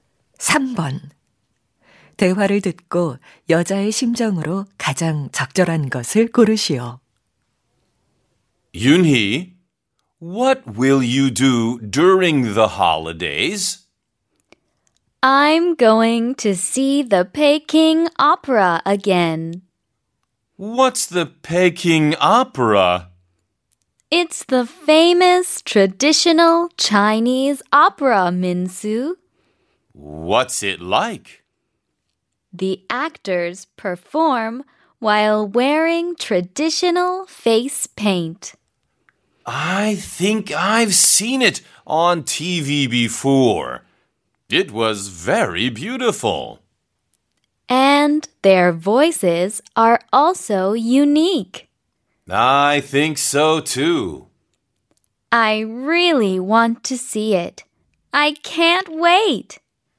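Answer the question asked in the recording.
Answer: 기대됨(신남)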